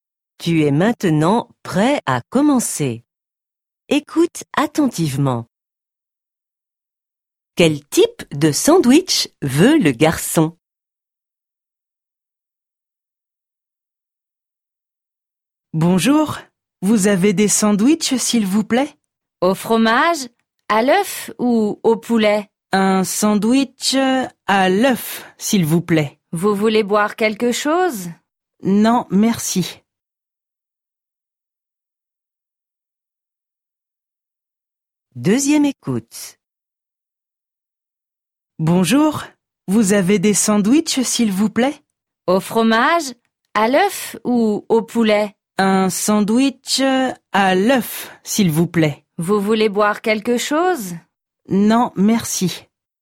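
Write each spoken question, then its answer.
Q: Quel type de sandwich veut le garçon?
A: Un sandwich à l'œuf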